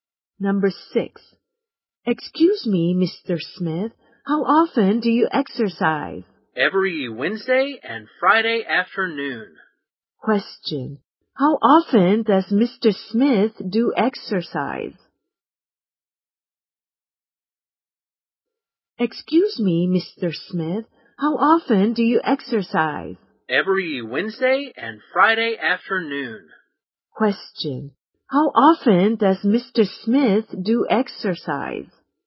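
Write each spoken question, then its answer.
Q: How often does Mr.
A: Twice a week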